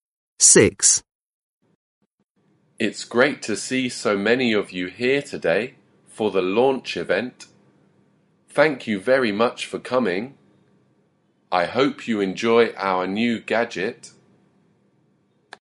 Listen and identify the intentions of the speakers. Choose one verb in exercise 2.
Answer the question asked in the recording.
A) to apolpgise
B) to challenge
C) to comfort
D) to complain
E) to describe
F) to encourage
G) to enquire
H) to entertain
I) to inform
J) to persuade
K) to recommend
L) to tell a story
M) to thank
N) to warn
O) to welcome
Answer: O) to welcome

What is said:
6. It's great to see so many of you here today for the launch event. Thank ou very much for coming. I hope you enjoy our new gadget.

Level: Lớp 10